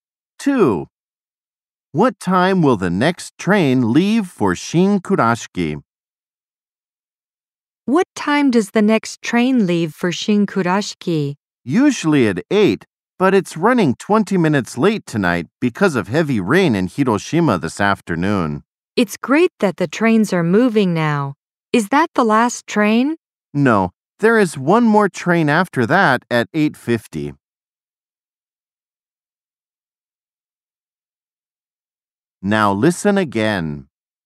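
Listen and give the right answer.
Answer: 8:20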